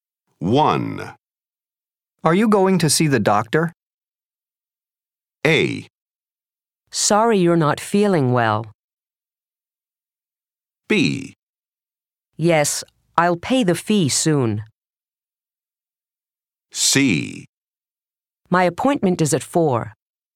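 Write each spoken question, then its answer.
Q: Are you going to see the doctor?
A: C: My appointment is at 4.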